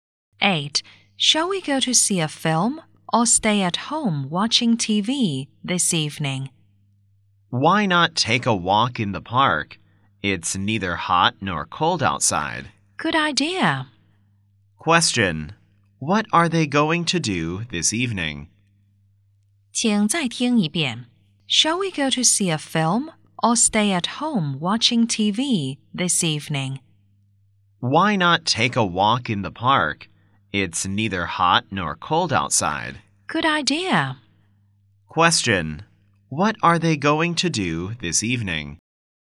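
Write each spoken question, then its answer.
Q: Question, what are they going to do this evening?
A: Take a walk in the park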